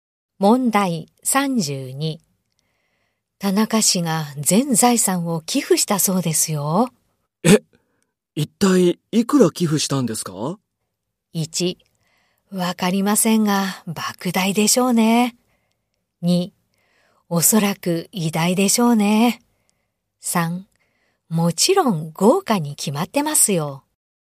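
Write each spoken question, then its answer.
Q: 田中氏が全財産を寄付したそうですよ。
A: 1: わかりませんが、莫大でしょうね。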